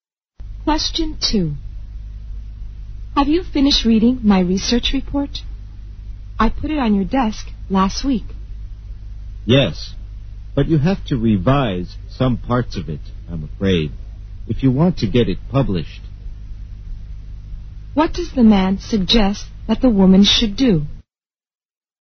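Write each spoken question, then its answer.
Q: What does the man suggest that the woman should do?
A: Revise some parts of her research report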